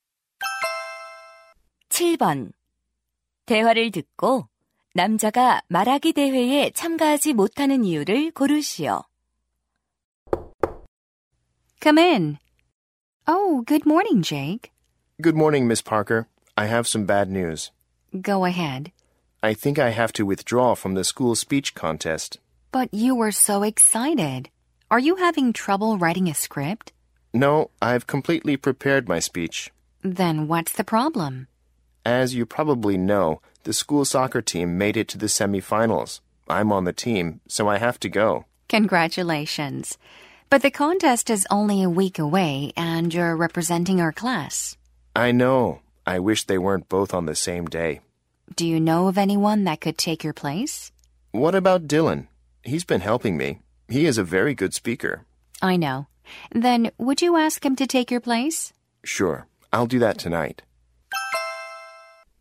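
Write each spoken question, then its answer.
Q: 대화를 듣고 남자가 말하기 대회에 참가하지 못하는 이유를 고르시오.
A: 학교 축구팀 준결승 경기에 참가해야 해서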